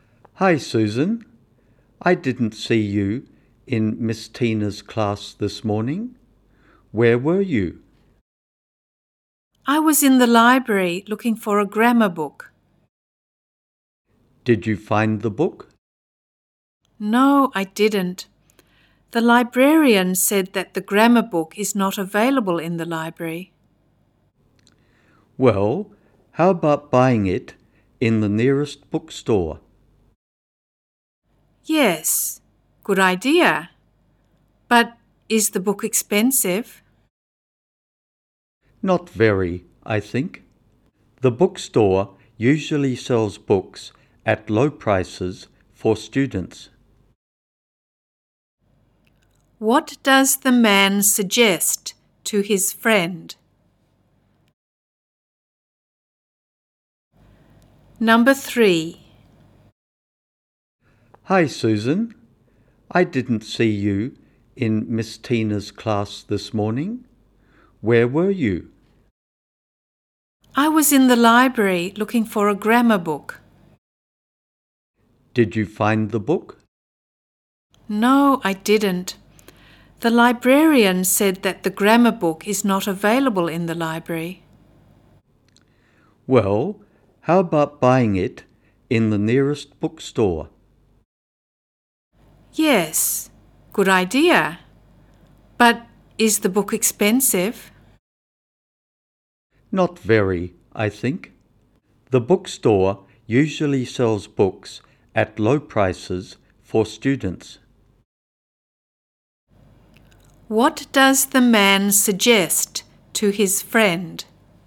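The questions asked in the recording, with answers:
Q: What does the man suggest to his friend?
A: Buying the grammar book at the nearest bookstore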